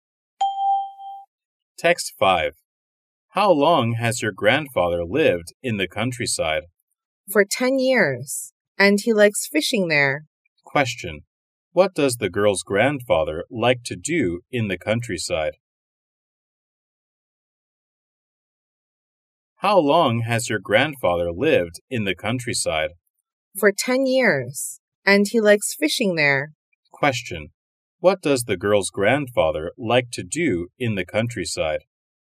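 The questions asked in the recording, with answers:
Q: What does the girl's grandfather like to do in the countryside?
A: Fishing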